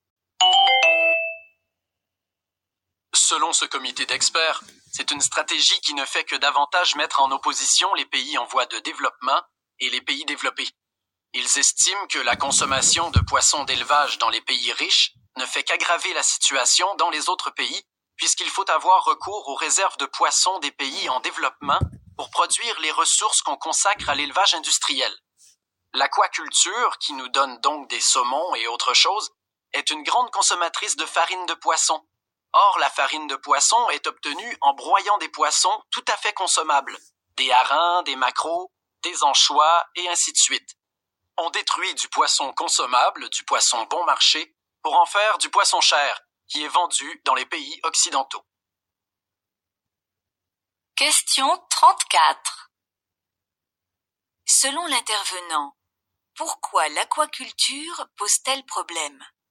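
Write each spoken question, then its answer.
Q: Selon l'intervenant, pourquoi l'aquaculture pose-t-elle problème?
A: Elle détruit du poisson bon marché des pays pauvres pour produire du poisson cher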